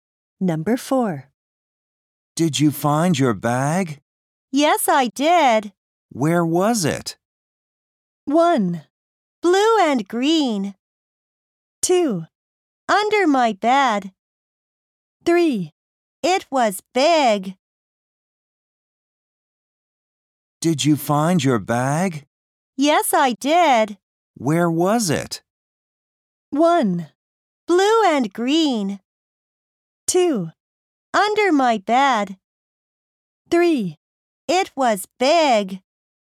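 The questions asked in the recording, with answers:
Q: Where was it?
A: 2: Under my bed.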